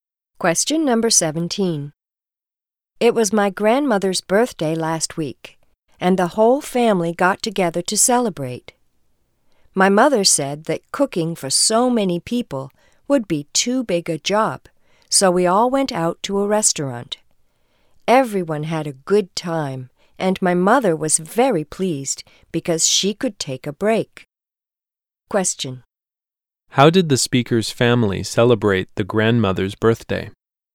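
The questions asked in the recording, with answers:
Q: How did the speaker's family celebrate the grandmother's birthday?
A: They went out to a restaurant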